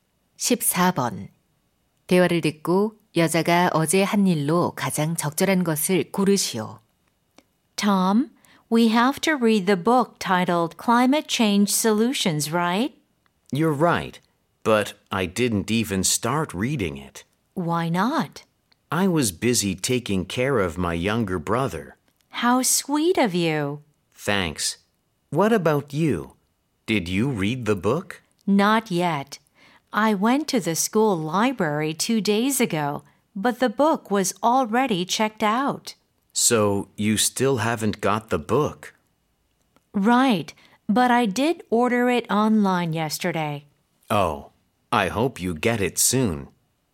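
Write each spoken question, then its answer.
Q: 대화를 듣고 여자가 어제 한 일로 가장 적절한 것을 고르시오.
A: 온라인으로 책 주문하기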